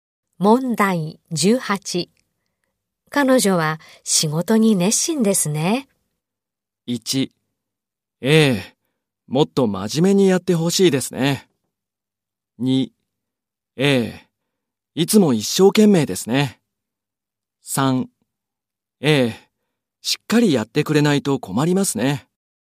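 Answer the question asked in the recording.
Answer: 2: ええ。いつも一生懸命ですね。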